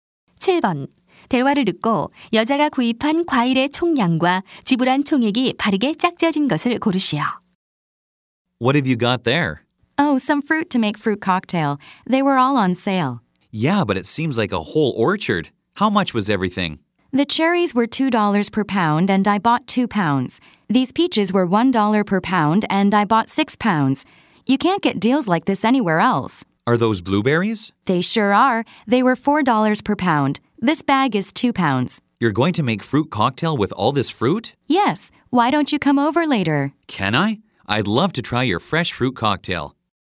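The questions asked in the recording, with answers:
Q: 대화를 듣고 여자가 구입한 과일의 총량과 지불한 총액이 바르게 짝지어진 것을 고르시오.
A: 10파운드, 18달러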